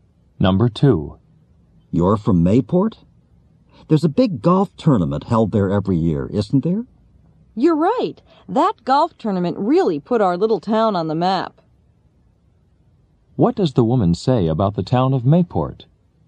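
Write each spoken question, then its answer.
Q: What does the woman say about the town of Mayport?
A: The golf tournament made the town well known.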